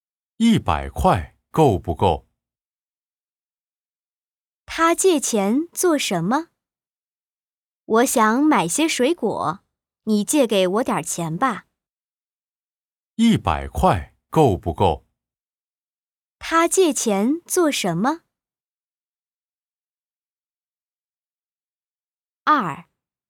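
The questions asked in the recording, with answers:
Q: 他借钱做什么?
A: 买水果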